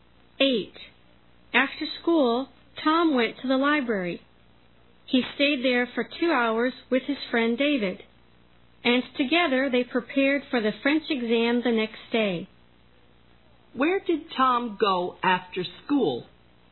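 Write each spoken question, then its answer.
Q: Where did Tom go after school?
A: The library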